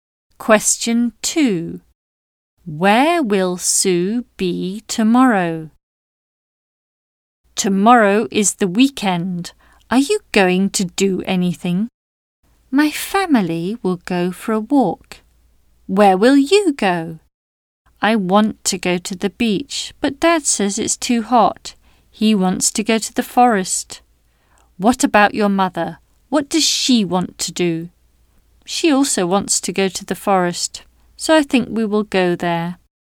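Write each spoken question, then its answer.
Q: Where will Sue be tomorrow?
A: In the forest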